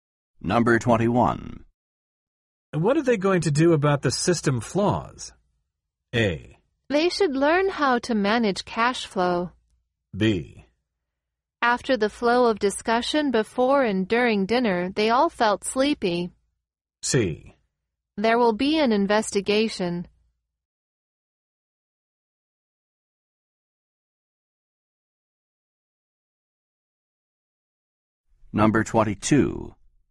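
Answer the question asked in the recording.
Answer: C: There will be an investigation.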